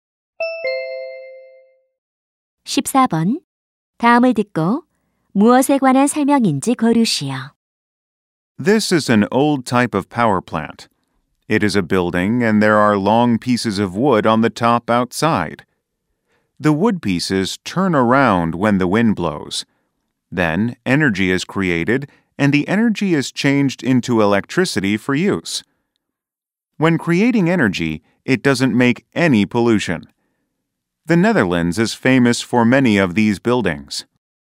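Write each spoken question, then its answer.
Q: 다음을 듣고 무엇에 관한 설명인지 고르시오.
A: 풍차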